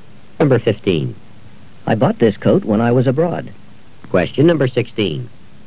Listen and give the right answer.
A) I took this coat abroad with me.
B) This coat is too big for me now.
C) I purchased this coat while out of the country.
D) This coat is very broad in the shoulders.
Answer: C) I purchased this coat while out of the country.

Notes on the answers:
I bought this coat when I was abroad.

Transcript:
14. Whoever wins this game gets to play against Molly in the finals.
15. I bought this coat when I was abroad.